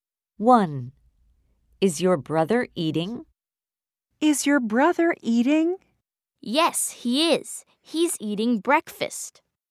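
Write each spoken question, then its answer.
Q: Is your brother eating?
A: Yes, he's eating breakfast.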